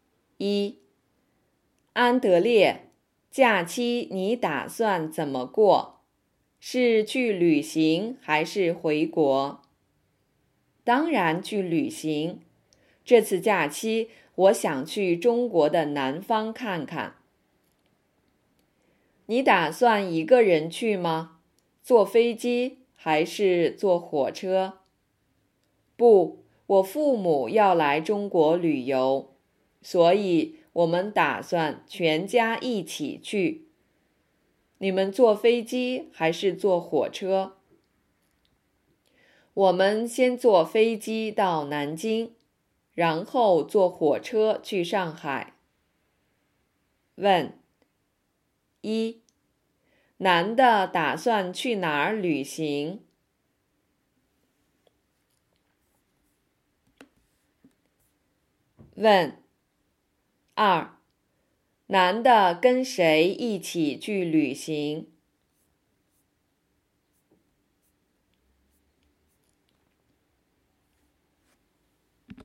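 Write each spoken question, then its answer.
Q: 男的打算去哪儿旅行?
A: 中国的南方(南京、上海)

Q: 男的跟谁一起去旅行?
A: 跟他父母(全家一起)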